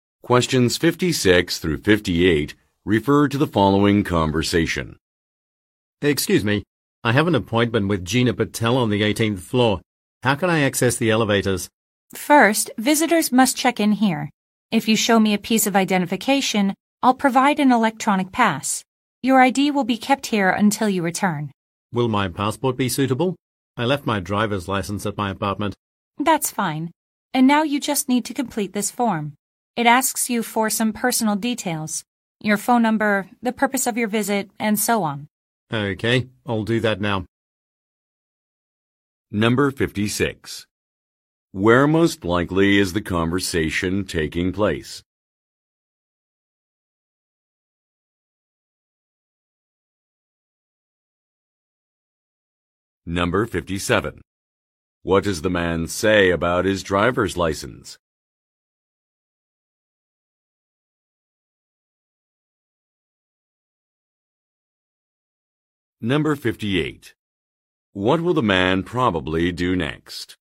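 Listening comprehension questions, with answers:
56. Where most likely is the conversation taking place?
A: At a security desk

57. What does the man say about his driver's license?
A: It was left at home.

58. What will the man probably do next?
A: Fill out a document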